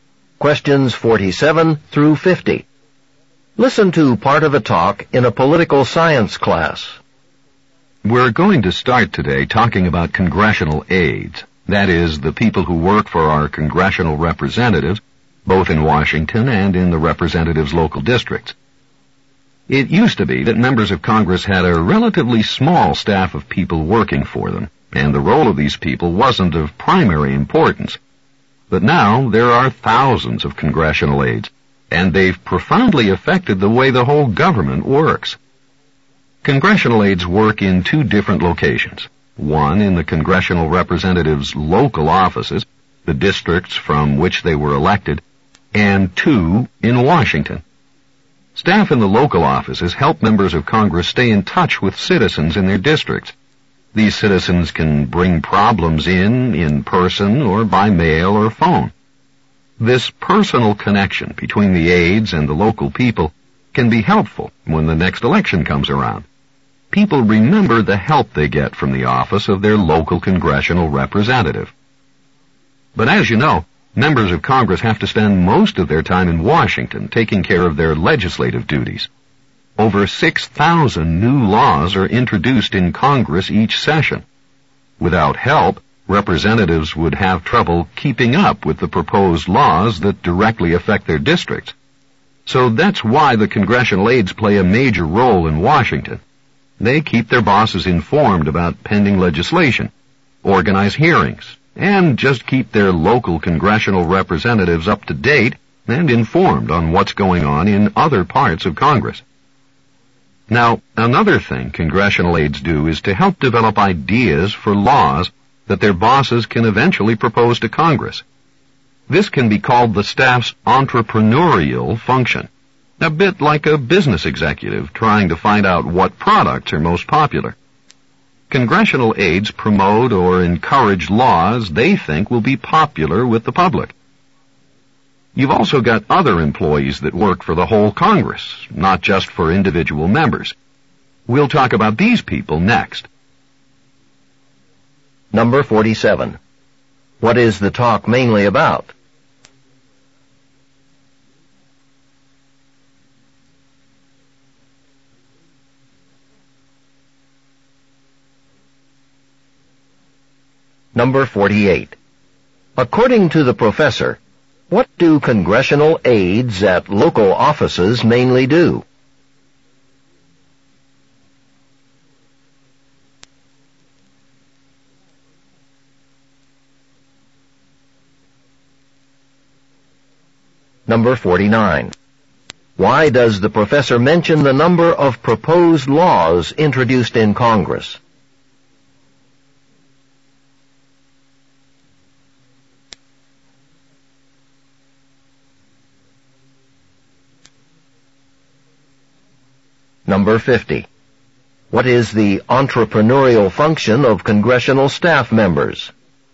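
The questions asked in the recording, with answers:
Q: What is the talk mainly about?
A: The role and work of congressional aides

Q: According to the professor, what do congressional aides at local offices mainly do?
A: Help members of Congress stay in touch with citizens in their districts

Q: Why does the professor mention the number of proposed laws introduced in Congress?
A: To show why representatives need aides to keep up with legislation

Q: What is the entrepreneurial function of congressional staff members?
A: Developing and promoting ideas for laws that will be popular with the public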